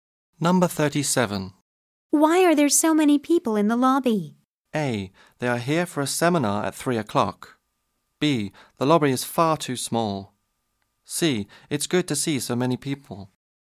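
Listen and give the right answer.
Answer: A: They are here for a seminar at 3 o'clock.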